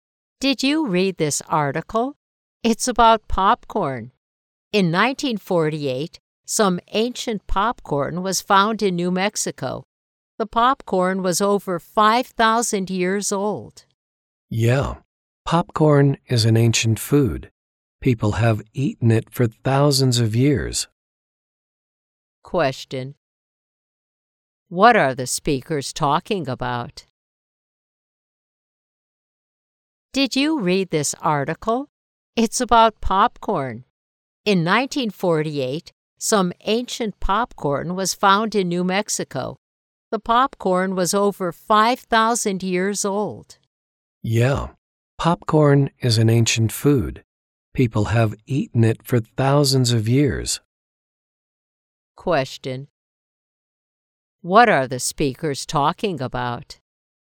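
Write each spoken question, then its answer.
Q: What are the speakers talking about?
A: Ancient popcorn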